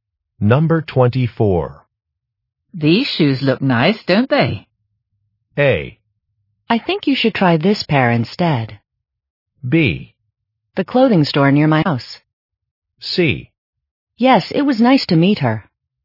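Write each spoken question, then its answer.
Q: These shoes look nice, don't they?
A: A: I think you should try this pair instead.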